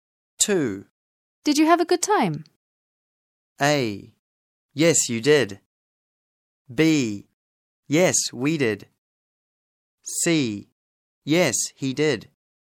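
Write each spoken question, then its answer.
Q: Did you have a good time?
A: B: Yes, we did.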